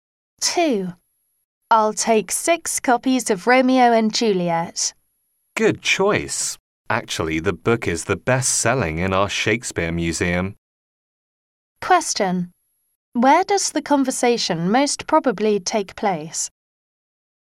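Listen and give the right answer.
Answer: In a bookshop at the Shakespeare Museum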